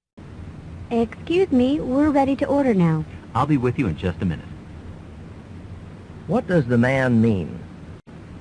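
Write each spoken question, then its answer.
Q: What does the man mean?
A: He will come to take their order shortly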